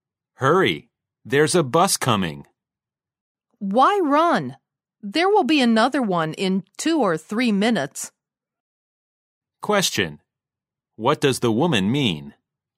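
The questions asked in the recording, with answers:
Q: What does the woman mean?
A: There's no need to hurry; another bus will come in 2 or 3 minutes.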